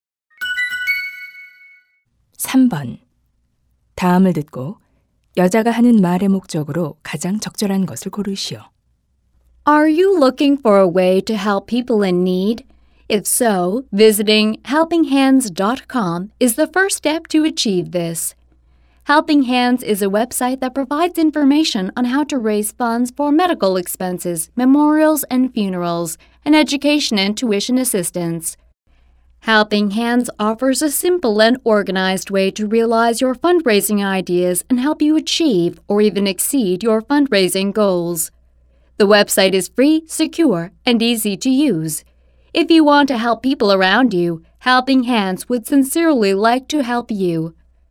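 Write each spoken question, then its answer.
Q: 다음을 듣고 여자가 하는 말의 목적으로 가장 적절한 것을 고르시오.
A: 모금 정보 웹사이트를 홍보하려고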